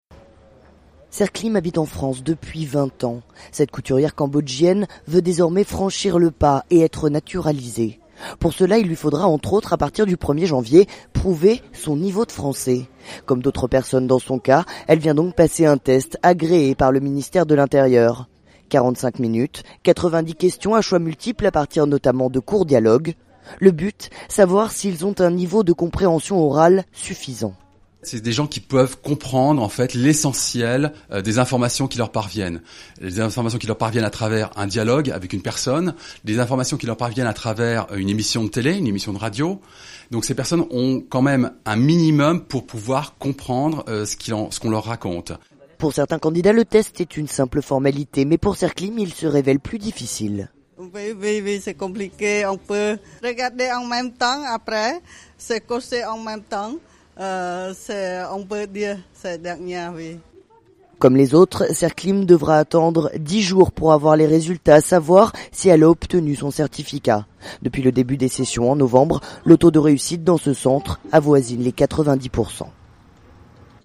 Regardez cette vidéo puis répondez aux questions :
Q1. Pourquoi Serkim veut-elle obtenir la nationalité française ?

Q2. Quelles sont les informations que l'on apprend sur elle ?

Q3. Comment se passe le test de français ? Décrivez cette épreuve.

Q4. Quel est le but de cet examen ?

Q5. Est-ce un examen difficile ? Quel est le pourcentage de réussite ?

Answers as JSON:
{"1": "Parce qu'elle habite en France depuis 20 ans.", "2": "Elle est Cambodgienne, habite en France depuis 20 ans et elle est couturière.", "3": "45 min, 90 questions à choix multiples, principalement à partir de courts dialogues.", "4": "Savoir si les candidats ont un niveau de compréhension orale suffisant pour devenir français.", "5": "Non, en général c'est une simple formalité, 90 % des gens réussissent le test."}

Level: Niveau 2 : intermédiaire